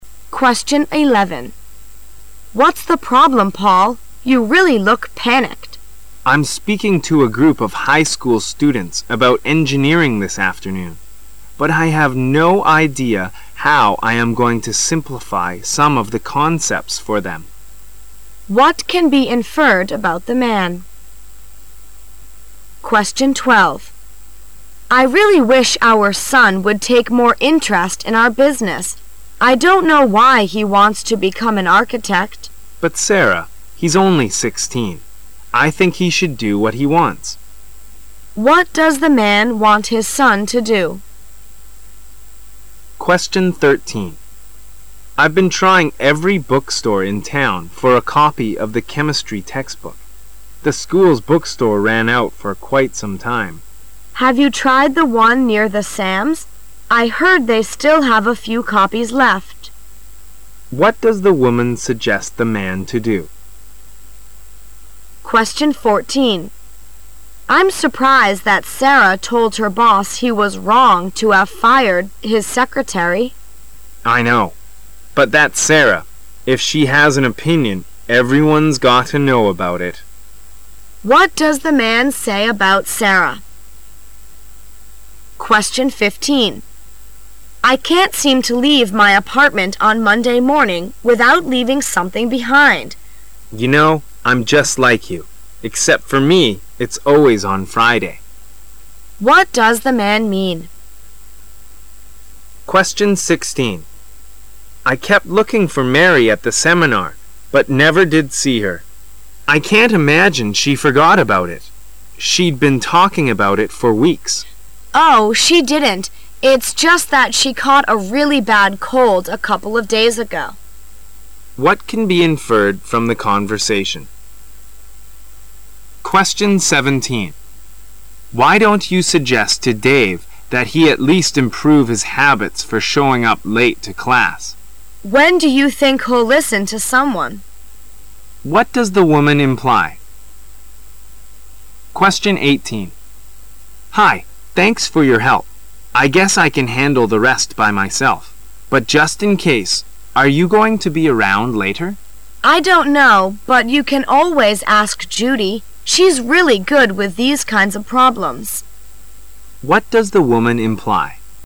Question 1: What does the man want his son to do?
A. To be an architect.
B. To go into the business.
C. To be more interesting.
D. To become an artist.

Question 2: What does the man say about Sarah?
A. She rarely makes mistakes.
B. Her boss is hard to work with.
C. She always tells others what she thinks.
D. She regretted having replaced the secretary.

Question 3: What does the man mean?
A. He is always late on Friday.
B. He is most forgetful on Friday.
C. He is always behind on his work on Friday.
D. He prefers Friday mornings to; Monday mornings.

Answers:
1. A. To be an architect.
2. C. She always tells others what she thinks.
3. B. He is most forgetful on Friday.

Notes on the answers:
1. 观点态度题。解答此题的关键是理解代词(what)所指示的内容(become an architect/To be an architect)。
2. 观点态度题。解答此题的关键是把形象的描述(If she has an opinion,everyone's got to know it)转换成一般的陈述(Sarah usually says what she thinks)。
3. 事实状况题。解答此题的关键是从对两人的对比(just like you,Except for me,it's always on Friday)中推导出其中一人的特点 (most forgetful on Friday)。

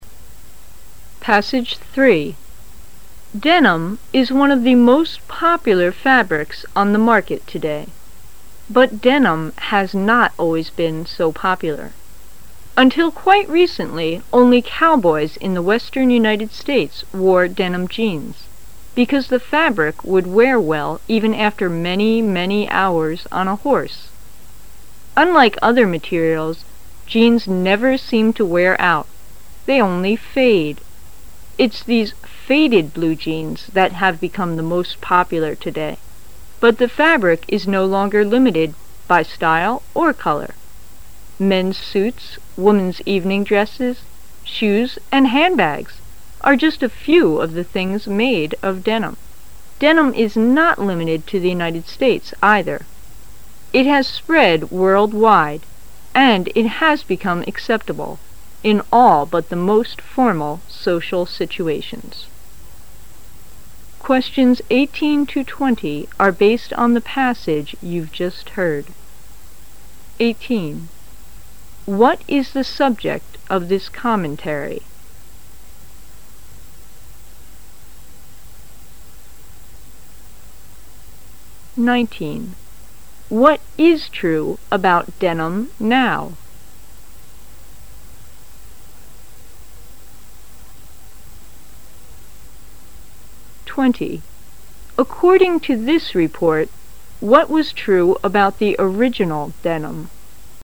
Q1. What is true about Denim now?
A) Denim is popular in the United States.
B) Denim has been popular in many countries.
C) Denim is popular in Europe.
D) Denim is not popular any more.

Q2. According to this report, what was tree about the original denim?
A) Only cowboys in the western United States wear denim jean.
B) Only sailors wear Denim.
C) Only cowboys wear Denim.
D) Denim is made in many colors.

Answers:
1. B) Denim has been popular in many countries.
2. A) Only cowboys in the western United States wear denim jean.

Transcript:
[解析] 18-20 Denim is one of the most popular fabrics on the market today. But denim has not always been so popular. Until quite recently, only cowboys in the Western United Stales wore denim Jeans because the fabric would wear well even after many, many hours on a horse. Unlike other materials, jeans never seem to wear out; they only fade. It's these faded blue-jeans that have become the most popular today. But the fabric is no longer limited, by style or color. Men's suits, women's evening dresses, shoes and handbags are just of a few of the things made of denim. Denim is not limited to the United States either, it has spread world wild and it has become acceptable in all but the most formal social situations. What is the subject of this commentary?

